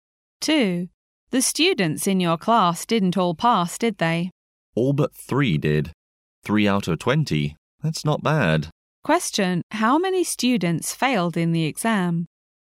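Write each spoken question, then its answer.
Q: How many students failed in the exam?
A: Three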